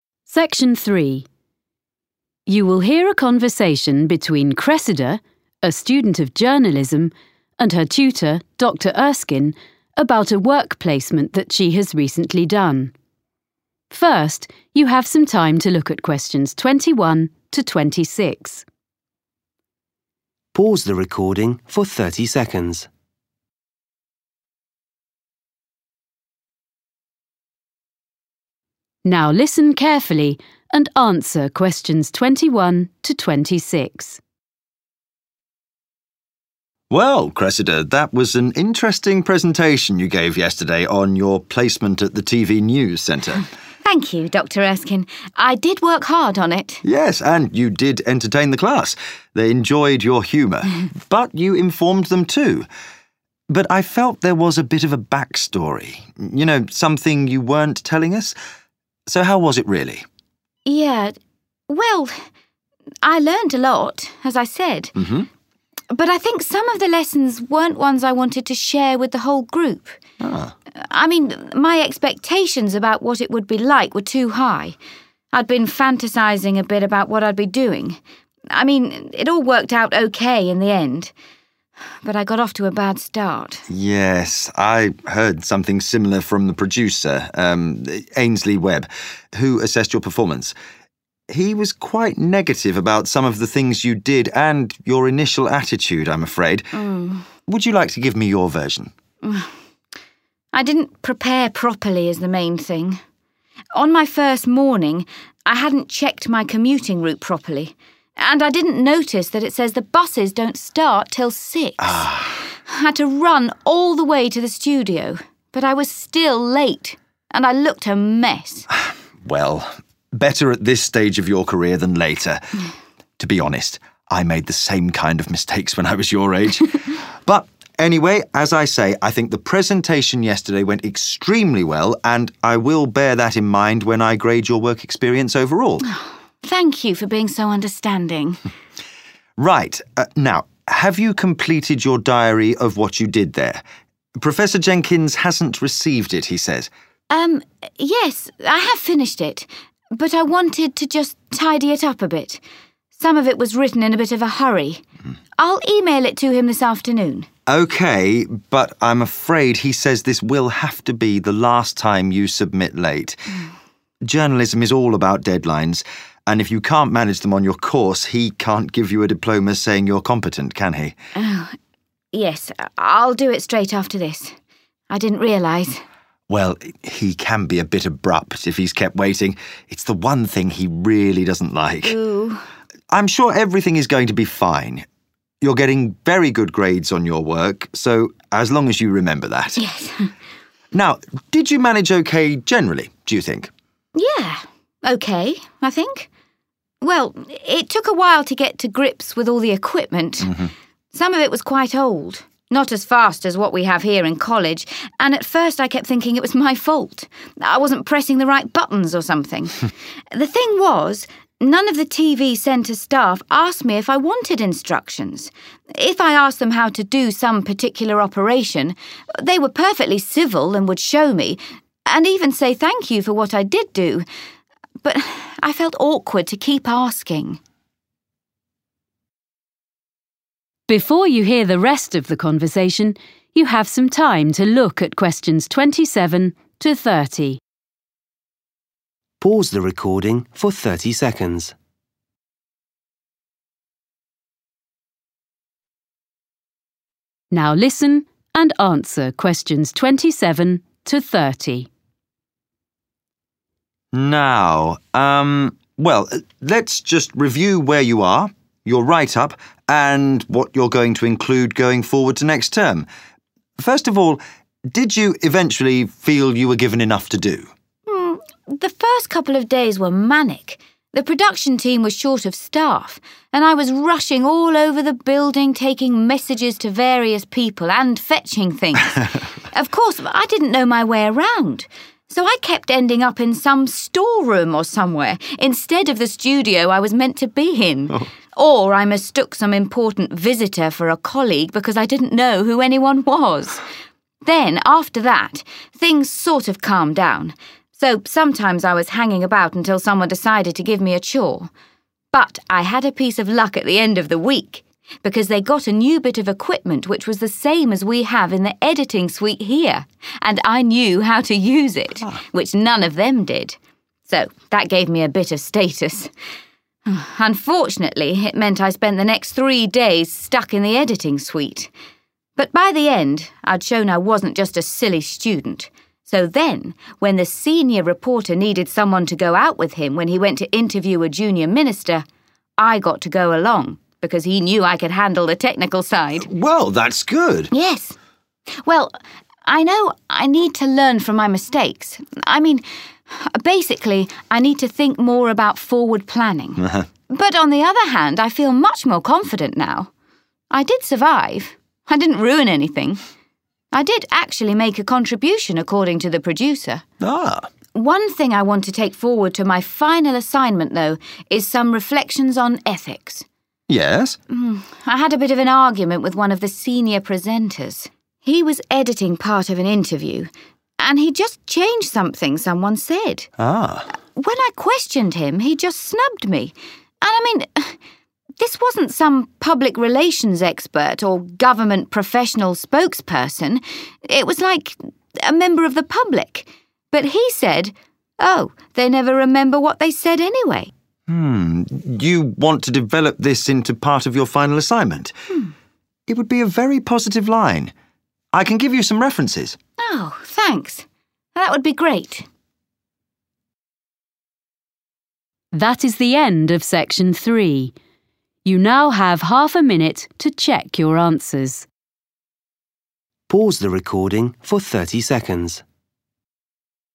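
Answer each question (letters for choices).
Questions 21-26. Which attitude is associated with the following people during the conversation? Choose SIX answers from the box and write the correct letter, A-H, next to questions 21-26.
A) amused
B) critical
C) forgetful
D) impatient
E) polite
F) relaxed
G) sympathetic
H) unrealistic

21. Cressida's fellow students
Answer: A

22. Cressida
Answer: H

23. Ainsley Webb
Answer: B

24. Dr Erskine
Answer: G

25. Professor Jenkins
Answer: D

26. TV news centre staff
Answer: E

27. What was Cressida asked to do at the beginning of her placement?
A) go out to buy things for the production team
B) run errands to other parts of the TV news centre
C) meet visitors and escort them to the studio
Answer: B

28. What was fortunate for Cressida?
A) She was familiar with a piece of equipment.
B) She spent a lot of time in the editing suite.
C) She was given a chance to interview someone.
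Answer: A

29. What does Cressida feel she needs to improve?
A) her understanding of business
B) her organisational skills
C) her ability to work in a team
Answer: B

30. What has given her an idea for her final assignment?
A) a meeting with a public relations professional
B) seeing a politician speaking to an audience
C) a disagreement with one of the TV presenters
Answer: C

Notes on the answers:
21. Yes and you did entertain the class, they enjoyed your humor (=amused), but you informed them too. (Vâng và bạn đã làm cả lớp vui, họ rất thích sự hài hước của bạn, nhưng bạn cũng đã cung cấp kiến thức cho họ).
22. I mean, my expectations about what it would be like were too high (=unrealistic) (Ý tôi là, kỳ vọng của tôi về việc nó sẽ diễn ra như thế nào là quá cao).
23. the producer – um. Ainsley Webb-who assessed your performance. He was quite negative (=critical) about some of the things you did, and your initial attitude, I'm afraid.
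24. To be honest, I made the same kind of mistakes (=sympathetic) when I was your age.
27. The first couple of days were manic, the production team was short of staff and I was rushing all over the building taking messages to various people and fetching things.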